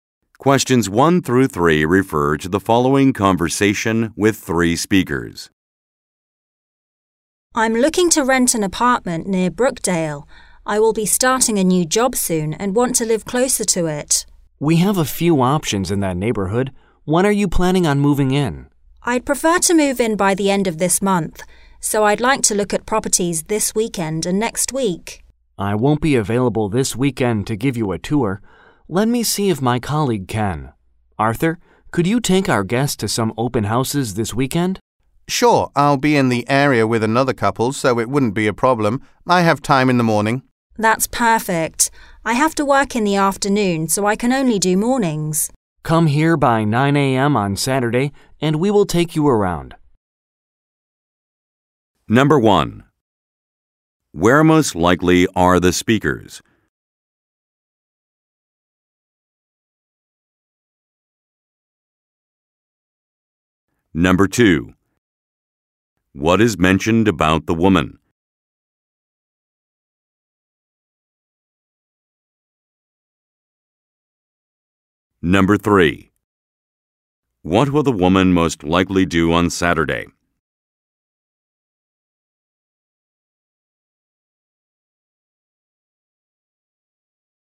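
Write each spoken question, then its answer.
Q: Where most likely are the speakers?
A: At a real estate agency

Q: What will the woman most likely do on Saturday?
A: Tour open houses in the morning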